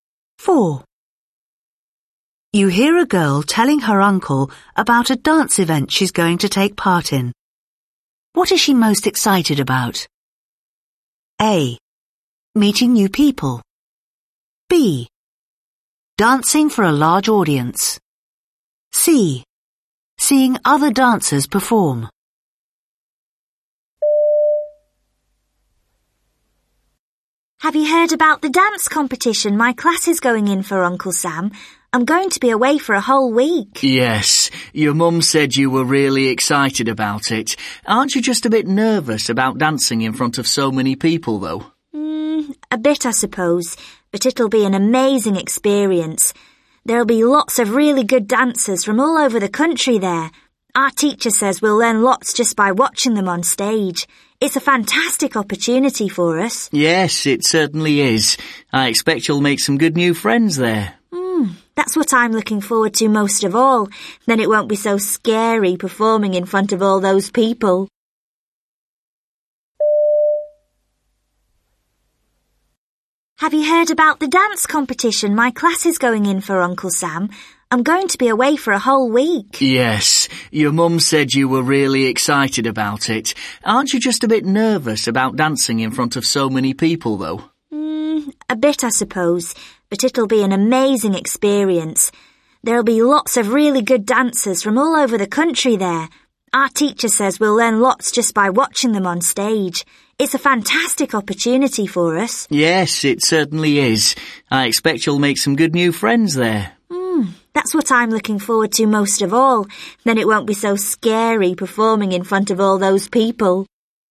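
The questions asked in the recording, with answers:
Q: What is she most excited about?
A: A: Meeting new people.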